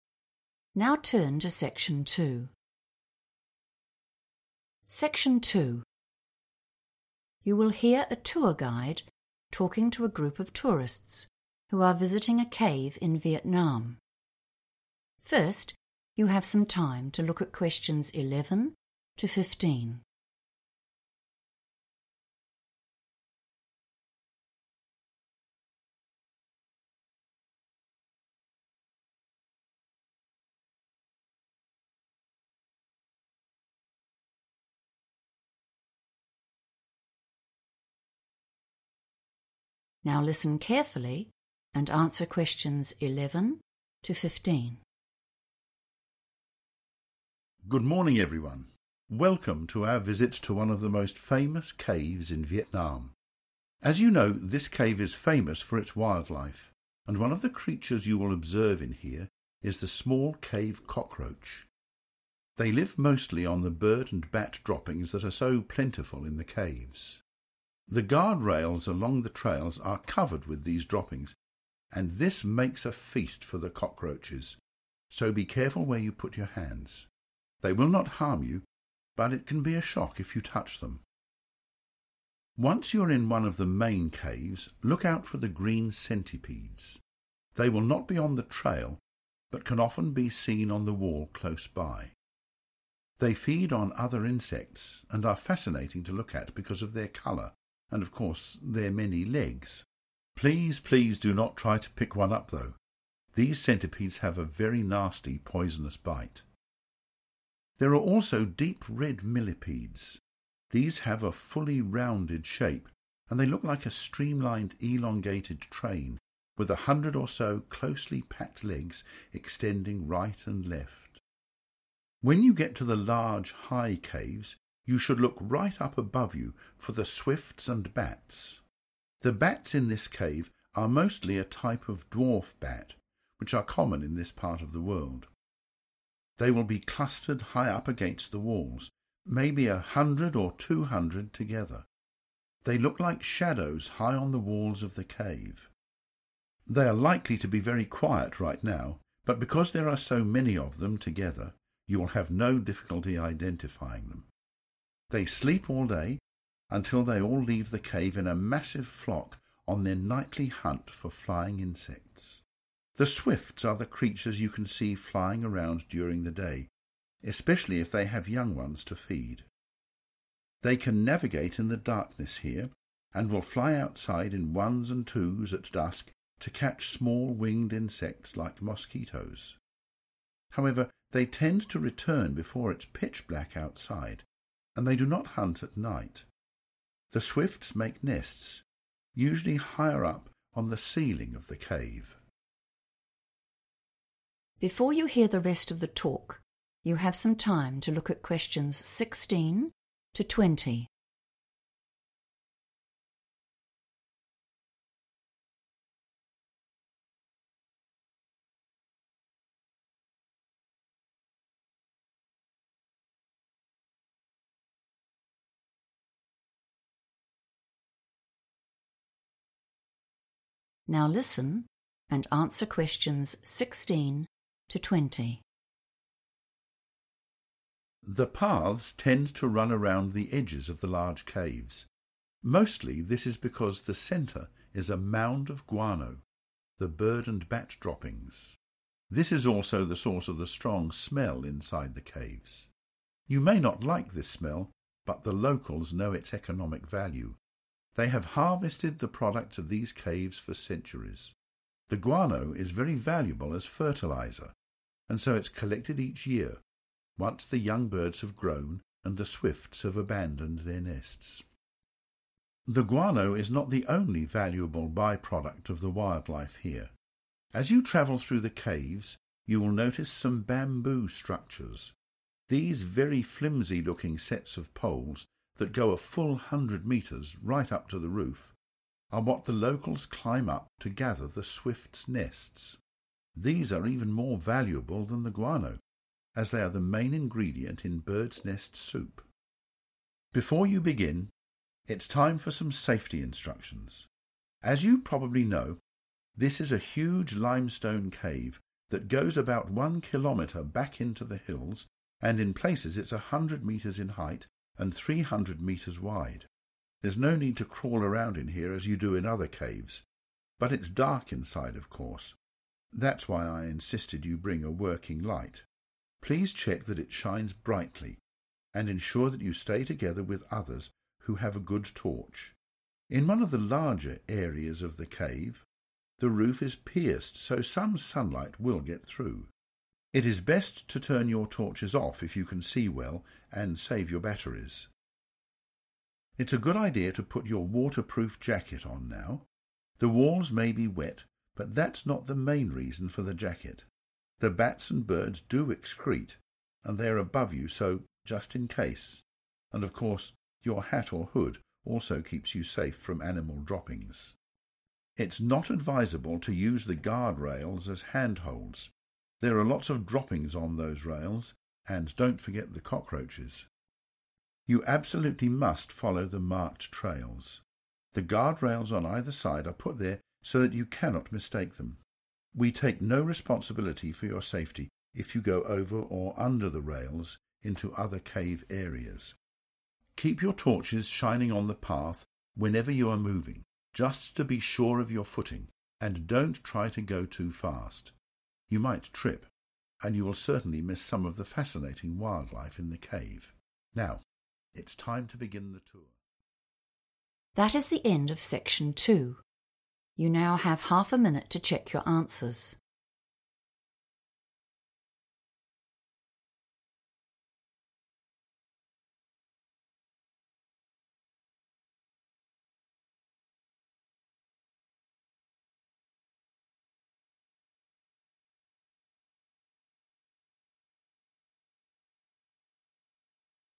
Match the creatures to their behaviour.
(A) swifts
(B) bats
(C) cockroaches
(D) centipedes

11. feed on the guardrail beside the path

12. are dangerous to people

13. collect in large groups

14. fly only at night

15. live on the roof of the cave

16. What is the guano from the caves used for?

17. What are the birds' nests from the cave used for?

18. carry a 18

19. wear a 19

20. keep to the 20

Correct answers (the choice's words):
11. cockroaches
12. centipedes
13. bats
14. bats
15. swifts
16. fertiliser / fertilizer
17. soup
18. working light / light / working torch / torch
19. waterproof jacket / jacket
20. marked trails / trails / marked path / path

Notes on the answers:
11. The correct answer is C because the guide mentions that bird and bat waste (called droppings) is found all over the metal rails next to the paths. The guide says this is a 'feast' (a big meal) for the cockroaches, meaning they eat it there.
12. The correct answer is D because the guide explicitly warns visitors that the green centipedes are dangerous. While the speaker says cockroaches will not harm you, they explain that centipedes have a poisonous bite. This makes them a threat to people who might try to touch them.
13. The correct answer is B because the guide explains that bats gather in groups of 100 or 200 on the cave walls. He uses the words 'clustered' and 'together' to show they collect in large groups. In contrast, other animals like swifts are mentioned as flying in 'ones and twos' (small groups) when they leave the cave to find food.
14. The correct answer is B because the speaker mentions that bats sleep during the whole day. They only fly out of the cave together when it is time for their nightly hunt to find insects to eat. Unlike the swifts, which fly during the day, bats are active and fly only when it is dark.
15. The correct answer is A because the text clearly states that swifts make their nests on the ceiling of the cave. The word 'ceiling' refers to the top surface inside a room or cave, which is synonymous with 'roof' in this context. While bats are also mentioned as being high up, they are described as being against the walls, whereas the swifts are specifically linked to the ceiling/roof where they build nests.
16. The correct answer is supported by the part of the transcript that talks about why locals collect animal waste, called guano. It says the guano is worth a lot of money because it is used as a fertiliser, which helps plants grow. Keywords to listen for include 'guano', 'valuable', and 'fertiliser'.
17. The correct answer is soup because the speaker explains that locals collect the nests found in the cave because they are very expensive and useful. The text specifically says that the nests are a key part of bird's nest soup.
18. The correct answer is chosen because the cave is dark, so the guide tells the group that they must bring a light that works well. The guide uses the words 'working light' and 'torch' to describe what people need to carry.
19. The correct answer is "(waterproof) jacket" because the guide tells visitors to wear one along with a hat. This is because birds and bats live high up in the cave and their waste, or "droppings," might fall on people from above. Wearing these clothes keeps the visitors clean while walking.
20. The correct answer is determined by the safety instructions given by the guide. He tells the visitors that they must 'follow the marked trails' and 'keep' their lights on the 'path'. These instructions emphasize staying within the designated walking zones marked by guardrails. The words 'follow' and 'keep' are used here as synonyms for staying on a specific route.

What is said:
Good morning, everyone. Welcome to our visit to one of the most famous caves in Vietnam.
As you know, this cave is famous for its wildlife, and one of the creatures you will observe in here is the small cave cockroach. They live mostly on the bird and bat droppings that are so plentiful in the caves. The guardrails along the trails are covered with these droppings, and this makes a feast for the cockroaches, so be careful where you put your hands. They will not harm you, but it can be a shock if you touch them!
Once you are in one of the main caves, look out for the green centipedes. They will not be on the trail but can often be seen on the wall close by. They feed on other insects and are fascinating to look at because of their colour, and, of course, their many legs. Please, please do not try to pick one up though; these centipedes have a very nasty poisonous bite.
There are also deep red millipedes. These have a fully rounded shape, and they look like a streamlined elongated train with a hundred or so closely packed legs extending right and left.
When you get to the large high caves, you should look right up above you for the swifts and bats. The bats in this cave are mostly a type of dwarf bat, which are common in this part of the world. They will be clustered high up against the walls – maybe a hundred or two hundred together. They look like shadows high on the walls of the cave. They are likely to be very quiet right now, but because there are so many of them together you will have no difficulty identifying them. They sleep all day until they all leave the cave in a massive flock on their nightly hunt for flying insects.
The swifts are the creatures you can see flying around during the day, especially if they have young ones to feed. They can navigate in the darkness here, and will fly outside in ones and twos at dusk to catch small winged insects like mosquitoes. However they tend to return before it is pitch black outside, and they do not hunt at night. The swifts make nests, usually higher up on the ceiling of the cave.
Before you hear the rest of the talk, you have some time to look at questions 16 to 20
Now listen and answer questions 16 to 20.
The paths tend to run around the edges of the large caves. Mostly this is because the centre is a mound of guano – the bird and bat droppings. This is also the source of the strong smell inside the caves. You may not like this smell, but the locals know its economic value. They have harvested the products of these caves for centuries. The guano is very valuable as fertiliser, and so it's collected each year, once the young birds have grown and the swifts have abandoned their nests.
The guano is not the only valuable by-product of the wildlife here. As you travel through the caves, you will notice some bamboo structures. These very flimsy looking sets of poles that go a full hundred metres, right up to the roof, are what the locals climb up to gather the swift's nests. These are even more valuable than the guano, as they are the main ingredient in bird's nest soup.
Before you begin, it's time for some safety instructions. As you probably know, this is a huge limestone cave that goes about one kilometre back into the hills and in places it's a hundred metres in height and three hundred metres wide. There is no need to crawl around in here as you do in other caves, but it is dark inside, of course ... that's why I insisted that you bring a working light – please check that it shines brightly, and ensure that you stay together with others who have a good torch. In one of the larger areas of the cave, the roof is pierced so some sunlight will get through. It is best to turn your torches off if you can see well, and save your batteries.
It is a good idea to put your waterproof jacket on now. The walls may be wet but that is not the main reason for the jacket. The bats and birds do excrete, and they are above you, so just in case ... and of course, your hat or hood also keeps you safe from animal droppings.
It's not advisable to use the guardrails as handholds. There are lots of droppings on those rails, and don't forget the cockroaches!
You absolutely must follow the marked trails. The guardrails on either side are put there so that you cannot mistake them. We take no responsibility for your safety if you go over or under the rails into other cave areas.
Keep your torches shining on the path whenever you are moving, just to be sure of your footing, and don't try to go too fast. You might trip, and you will certainly miss some of the fascinating wildlife in the cave.
Now it's time to begin the tour ...
That is the end of section 2. You now have half a minute to check your answers.